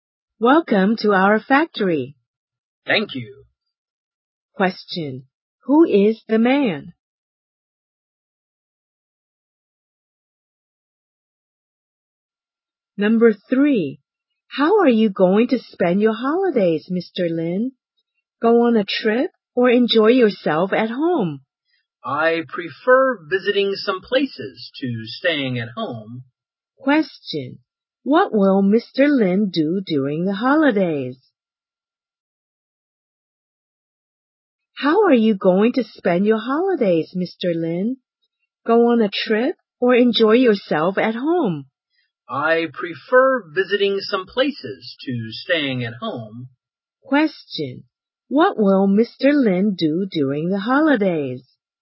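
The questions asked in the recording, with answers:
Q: What will Mr. Lin do during the holidays?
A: Go on a trip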